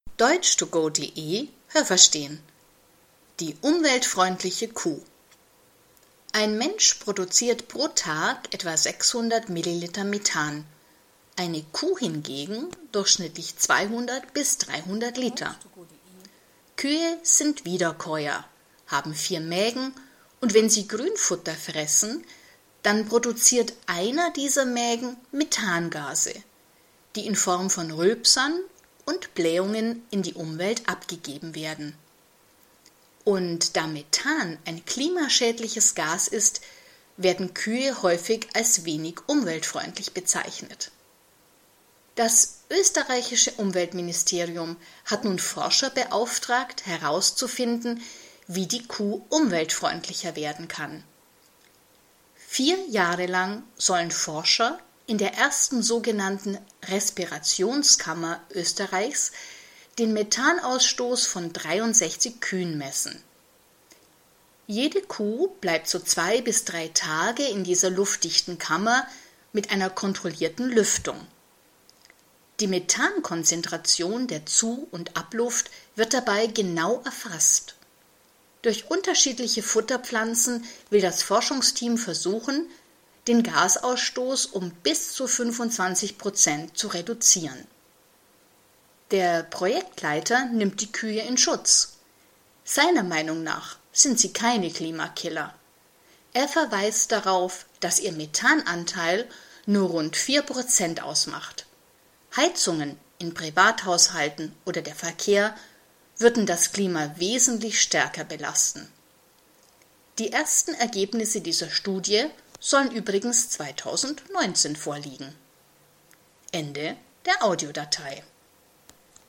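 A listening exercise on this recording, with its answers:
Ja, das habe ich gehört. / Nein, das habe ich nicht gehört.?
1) Einer der vier Mägen einer Kuh produziert täglich 200 bis 300 Liter Methangas.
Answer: Ja, das habe ich gehört.

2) Das Methangas, das Kühe produzieren, wird in besonders starker Konzentration an die Umwelt abgegeben.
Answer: Nein, das habe ich nicht gehört.

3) Forscher des Umweltministeriums sollen eine Möglichkeit finden, wie Kühe umweltfreundlicher werden sollen.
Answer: Nein, das habe ich nicht gehört.

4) 63 Kühe bleiben vier Jahre lang in einer luftdichten Kammer mit einer kontrollierten Lüftung.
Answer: Nein, das habe ich nicht gehört.

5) Forscher variieren die Futterpflanzen und wollen dadurch den Gasausstoß auf 25 Prozent reduzieren.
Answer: Nein, das habe ich nicht gehört.

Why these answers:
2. Es wird in Form von Rülpsern und Blähungen abgegeben, aber über die Konzentration wird nichts gesagt.
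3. Das Umweltministerium hat Forscher beauftragt, aber der Text sagt nicht, dass es sich um Forscher im Umweltministerium handelt.
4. Von den 63 Kühen bleibt jede Kuh so zwei bis drei Tage in einer luftdichten Kammer.

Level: C2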